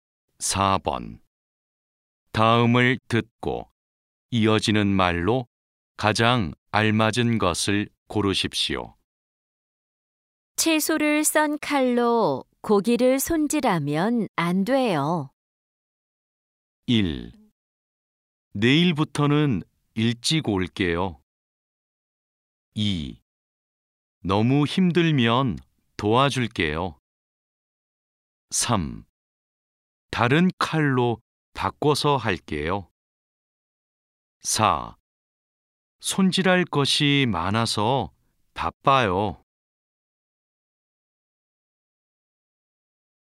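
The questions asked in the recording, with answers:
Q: 다음을 듣고 이어지는 말로 가장 알맞은 것을 고르십시오.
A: 3: 다른 칼로 바꿔서 할게요.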